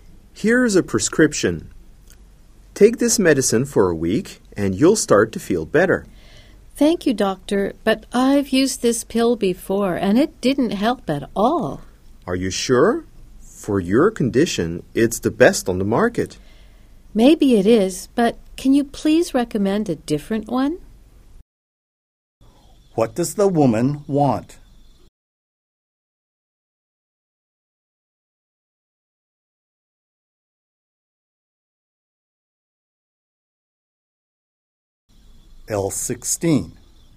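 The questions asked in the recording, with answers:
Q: What does the woman want?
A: A different medicine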